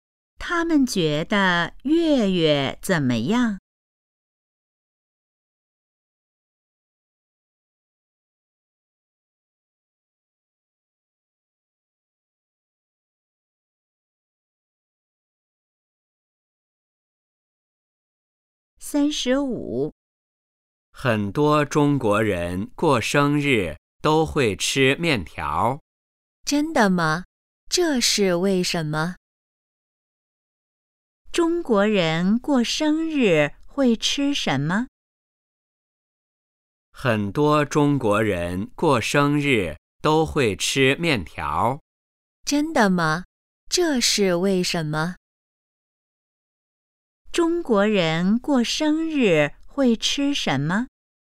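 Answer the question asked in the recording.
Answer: 面条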